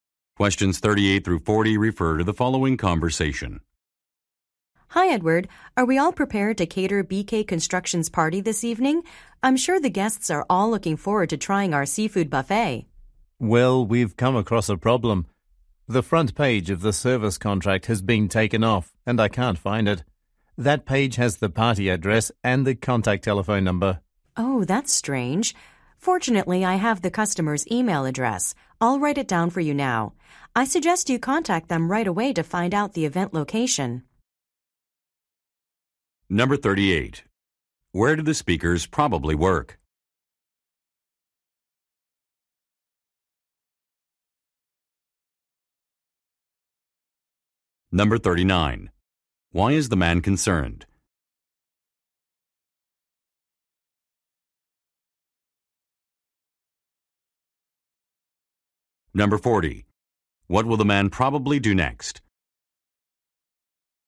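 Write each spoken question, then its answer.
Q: Where do the speakers probably work?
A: At a catering company

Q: Why is the man concerned?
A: A page of the contract with the party address is missing

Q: What will the man probably do next?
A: Contact the customer by email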